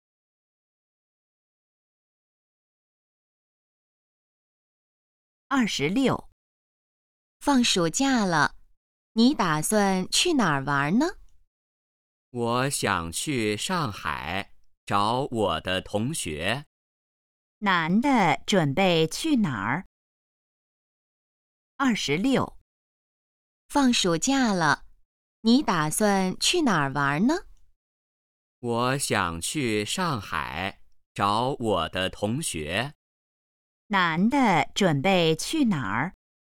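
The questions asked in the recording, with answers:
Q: 男的准备去哪儿?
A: 上海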